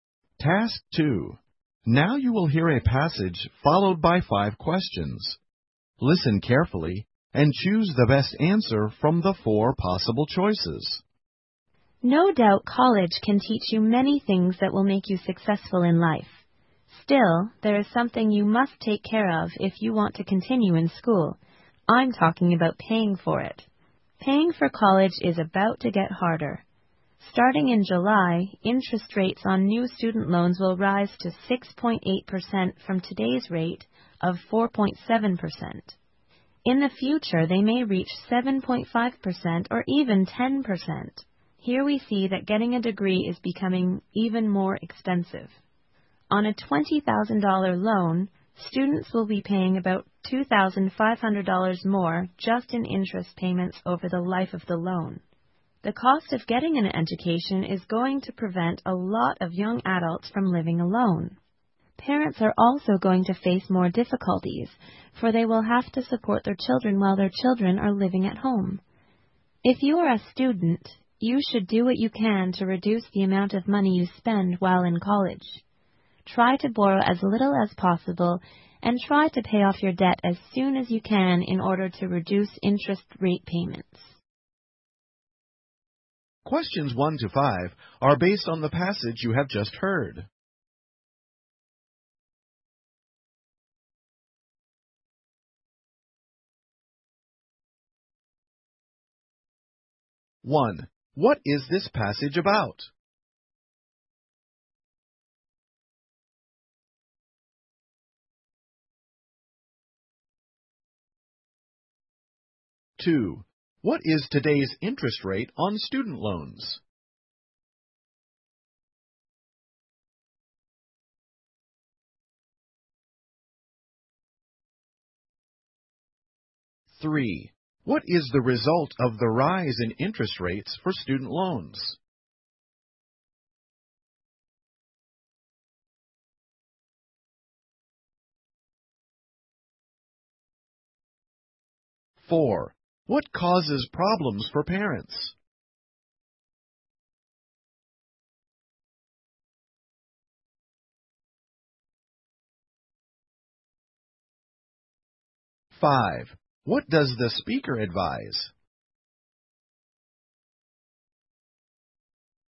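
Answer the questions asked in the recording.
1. Paying for college is getting harder because student loan interest rates are rising.
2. 4.7%
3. Getting a degree becomes more expensive.
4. Having to support their children while the children live at home.
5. Borrow as little as possible and pay off debt as soon as possible.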